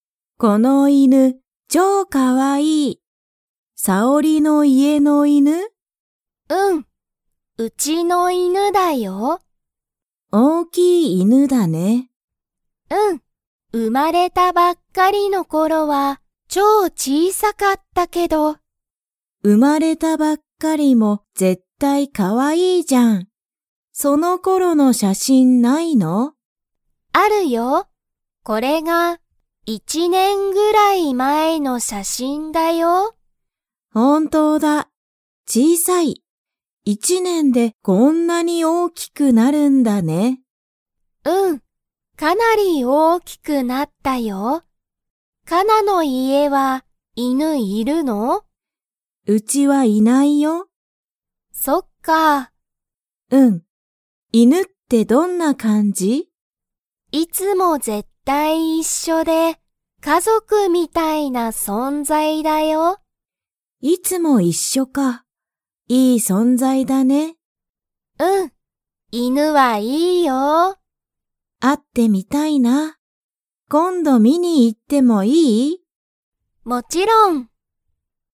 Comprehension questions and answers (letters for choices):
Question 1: さおりの犬(いぬ)は、生(う)まれたばっかりの頃(ころ)、超(ちょう)____。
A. 難(むずか)しかった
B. 大変(たいへん)だった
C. 小(ちい)さかった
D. 有名(ゆうめい)だった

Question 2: かなの家(いえ)は、犬(いぬ)がいますか?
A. はい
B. いいえ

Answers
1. C
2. B

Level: Level 2